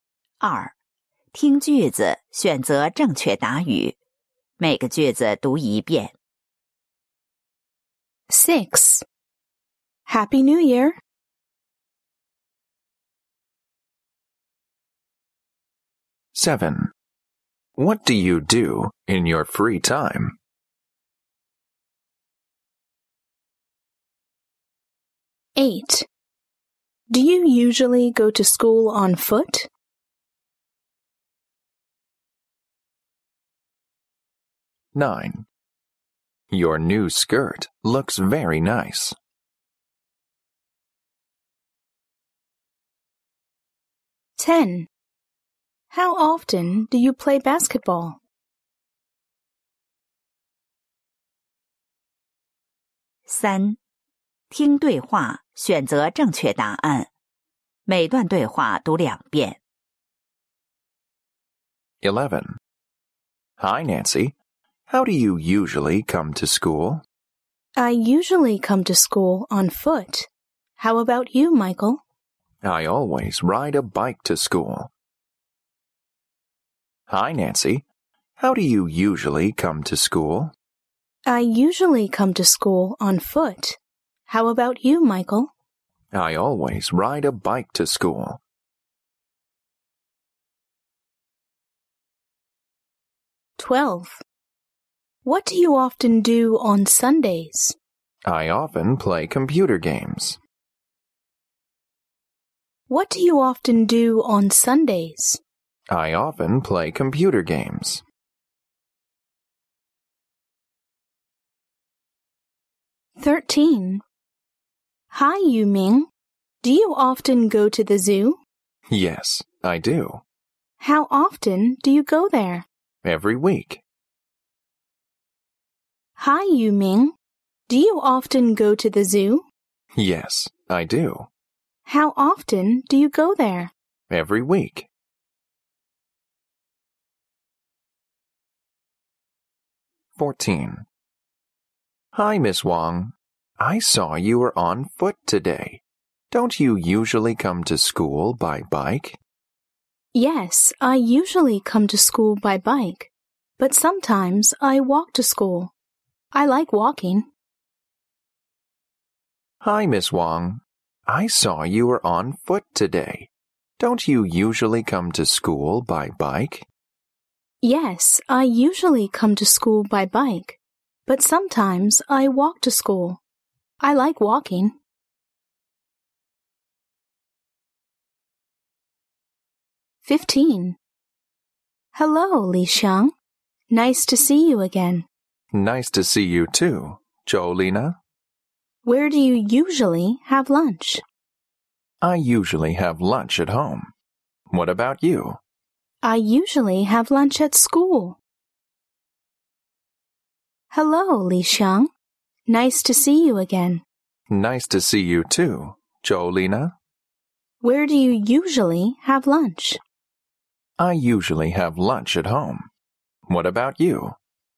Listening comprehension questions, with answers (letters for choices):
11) How does Michael usually come to school?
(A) By bus.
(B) By bike.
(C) On foot.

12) What does the man often do on Sundays?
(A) He plays computer games.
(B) He plays basketball.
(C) He plays football.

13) How often does Yu Ming go to the zoo?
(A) Every month.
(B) Every day.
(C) Every week.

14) How does Miss Wang sometimes come to school?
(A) By bike.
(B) By bus.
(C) On foot.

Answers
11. B
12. A
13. C
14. C

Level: 七年级